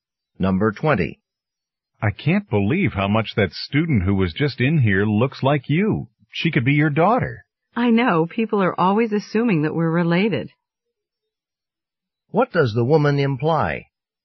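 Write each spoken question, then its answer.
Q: What does the woman imply?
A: She and the student are not related.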